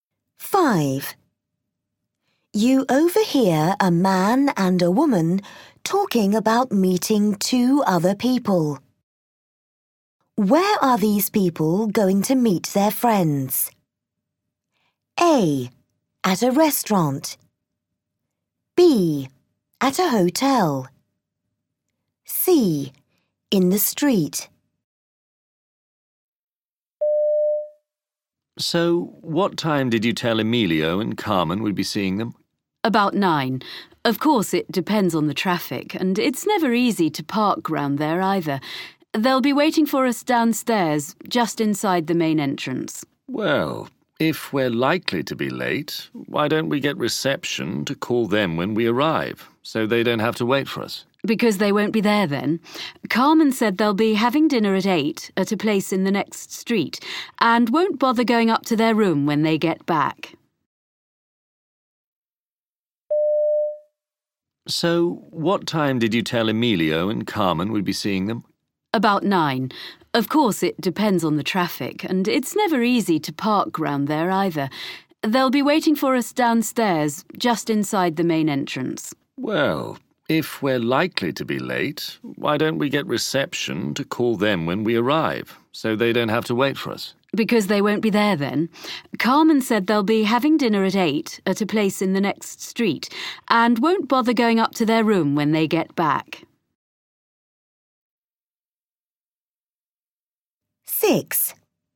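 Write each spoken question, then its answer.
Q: Where are these people going to meet their friends?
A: B: At a hotel.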